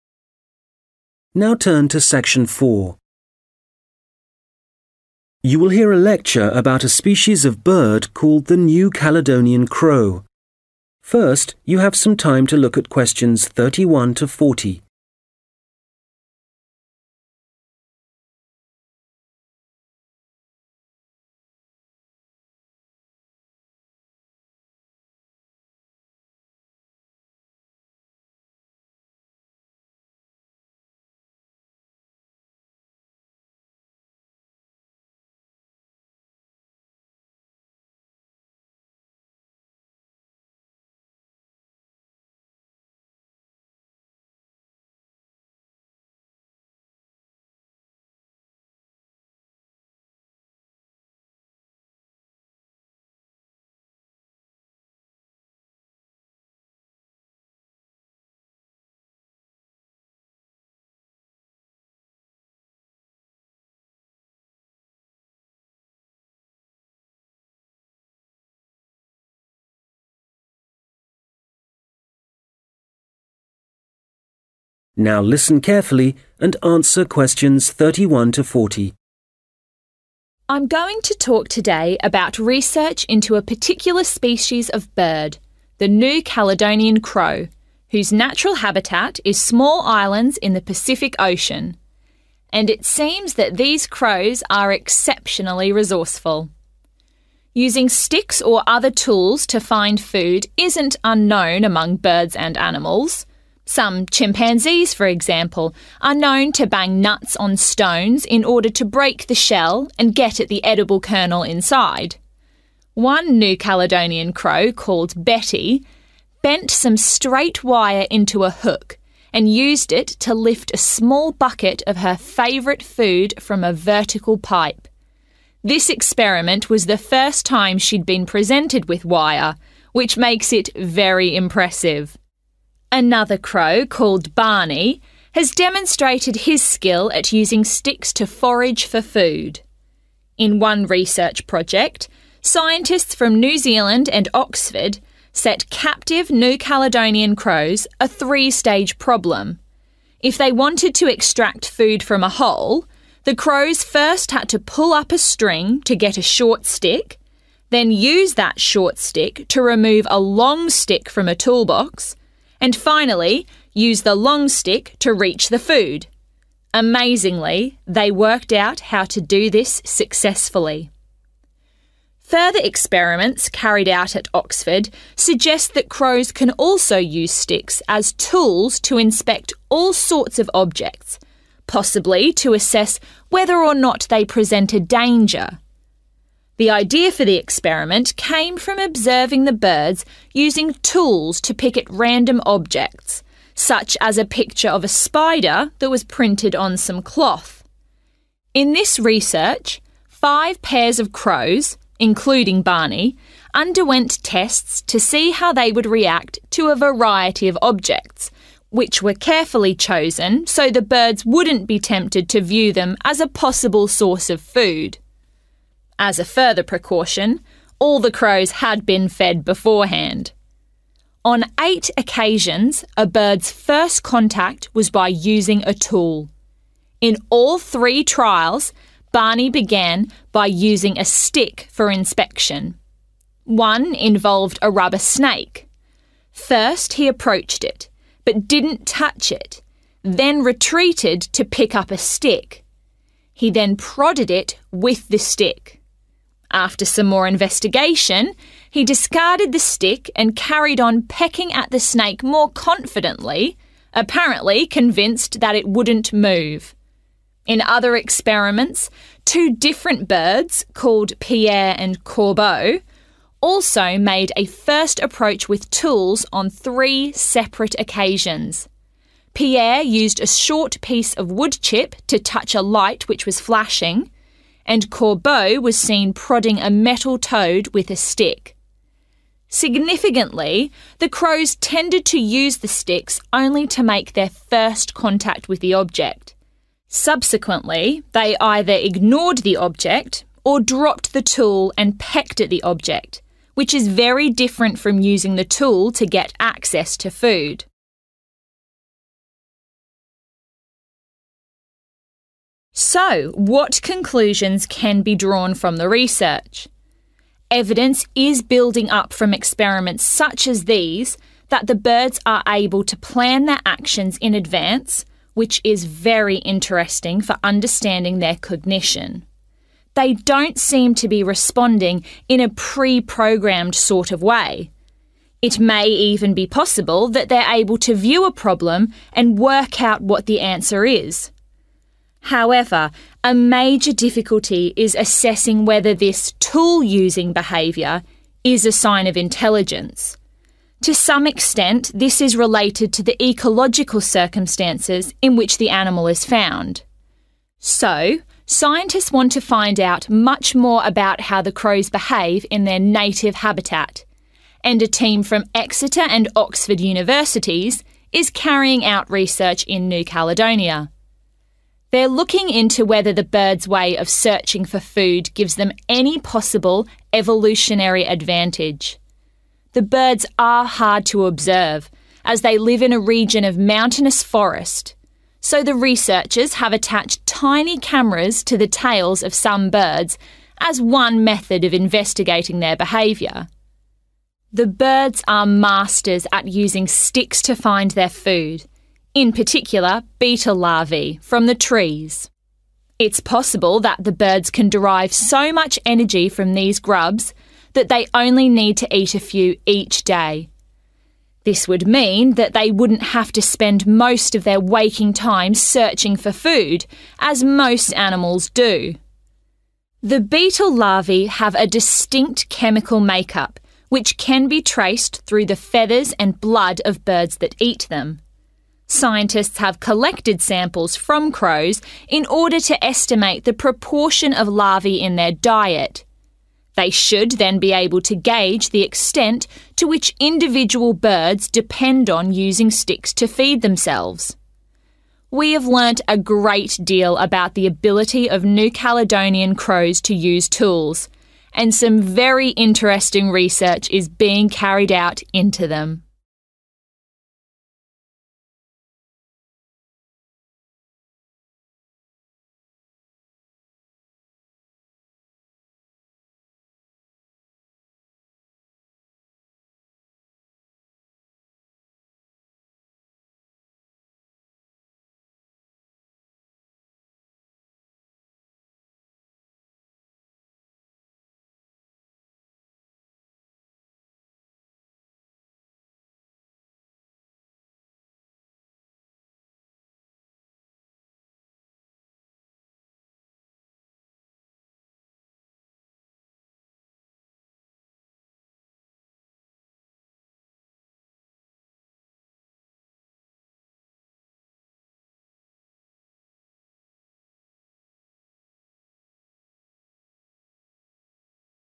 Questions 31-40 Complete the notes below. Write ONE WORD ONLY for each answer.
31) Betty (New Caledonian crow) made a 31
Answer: hook

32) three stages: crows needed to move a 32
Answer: string

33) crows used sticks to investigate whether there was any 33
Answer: danger

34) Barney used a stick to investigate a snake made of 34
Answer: rubber

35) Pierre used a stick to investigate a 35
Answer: light

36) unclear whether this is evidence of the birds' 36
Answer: intelligence

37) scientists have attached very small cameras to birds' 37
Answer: tail

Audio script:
I'm going to talk today about research into a particular species of bird, the New Caledonian crow, whose natural habitat is small islands in the Pacific Ocean. And it seems that these crows are exceptionally resourceful.
Using sticks or other tools to find food isn't unknown among birds and animals. Some chimpanzees, for example, are known to bang nuts on stones, in order to break the shell and get at the edible kernel inside. (Q31) One New Caledonian crow, called Betty, bent some straight wire into (= made out of wire) a hook and used it to lift a small bucket of her favourite food from a vertical pipe. Another crow, called Barney, has demonstrated his skill at using sticks to forage for food.
In one research project, scientists from New Zealand and Oxford set captive New Caledonian crows (Q32) a three-stage problem: if they wanted to extract food from a hole, the crows first had to pull up a string to get a short stick (= to reach a short stick) [một vấn đề gồm ba giai đoạn: nếu chúng muốn lấy thức ăn từ một cái lỗ, trước tiên những con quạ phải kéo một sợi dây để lấy một cây gậy ngắn], then use that short stick to remove a long stick from a toolbox, and finally use the long stick to reach the food. Amazingly, they worked out how to do this successfully.
(Q33) Further experiments carried out at Oxford suggest that crows can also use sticks as tools to inspect (= investigate) all sorts of objects, possibly to assess whether or not they present a danger. In this research, five pairs of crows – including Barney – underwent tests to see how they would react to a variety of objects, which were carefully chosen so the birds wouldn't be tempted to view them as a possible source of food. As a further precaution, all the crows had been fed beforehand.
On eight occasions, a bird's first contact was by using a tool. (Q34) In all three trials, Barney began by using a stick for inspection (= Barney used a stick to investigate). One involved a rubber snake. Một trong số đó bao gồm một con rắn cao su.] First he approached it, but didn't touch it, then retreated to pick up a stick. He then prodded it with the stick. After some more investigation, he discarded the stick and carried on pecking at the snake more confidently – apparently convinced that it wouldn't move.
In other experiments, two different birds, called Pierre and Corbeau, also made a first approach with tools on three separate occasions. (Q35) Pierre used a short piece of woodchip to touch a light which was flashing, [Pierre dùng một mẩu gỗ ngắn để chạm vào một ngọn đèn đang nhấp nháy] and Corbeau was seen prodding a metal toad with a stick.
Significantly, the crows tended to use the sticks only to make their first contact with the object. Subsequently, they either ignored the object or dropped the tool and pecked at the object – which is very different from using the tool to get access to food.
So what conclusions can be drawn from the research? Evidence is building up from experiments such as these that the birds are able to plan their actions in advance, which is very interesting for understanding their cognition. They don't seem to be responding in a pre-programmed sort of way: it may even be possible that they're able to view a problem and work out what the answer is. (Q36) However, a major difficulty is assessing whether this tool-using behaviour is a sign of (= whether this is evidence of) intelligence.
So scientists want to find out much more about how the crows behave in their native habitat, and a team from Exeter and Oxford universities is carrying out research in New Caledonia. They're looking into whether the birds' way of searching for food gives them any possible evolutionary advantage.
The birds are masters at using sticks to find their food, in particular beetle larvae from the trees. This would mean that they wouldn't have to spend most of their waking time searching for food, as most animals do.
(Q39) The beetle larvae have a distinct chemical make-up (= composition), which can be traced through the feathers and blood of birds that eat them (= can be identified in birds that feed on them).